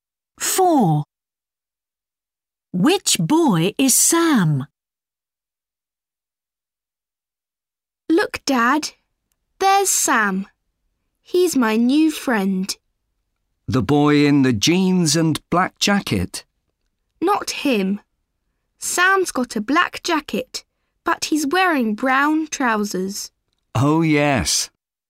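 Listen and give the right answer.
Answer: The boy in a black jacket and brown trousers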